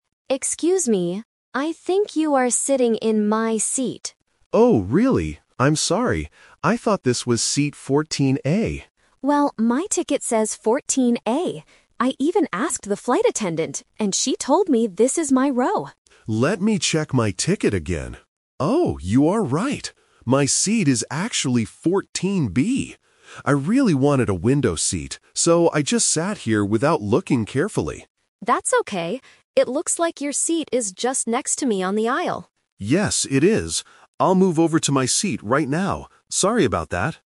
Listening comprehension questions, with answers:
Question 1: What is Passenger A's seat number?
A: 14A.

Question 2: Why did Passenger B sit in the wrong place?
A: Because he wanted a window seat.

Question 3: Where is Passenger B going to sit now?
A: In the aisle seat.

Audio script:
Passenger A: Excuse me. I think you are sitting in my seat.
Passenger B: Oh, really? I'm sorry. I thought this was seat 14A.
Passenger A: Well, my ticket says 14A. I even asked the flight attendant, and she told me this is my row.
Passenger B: Let me check my ticket again. Oh, you are right! My seat is actually 14B. I really wanted a window seat, so I just sat here without looking carefully.
Passenger A: That's okay. It looks like your seat is just next to me on the aisle.